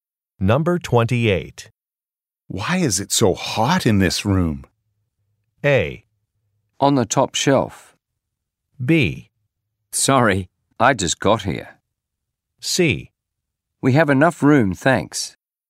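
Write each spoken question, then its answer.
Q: Why is it so hot in this room?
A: B: Sorry, I just got here.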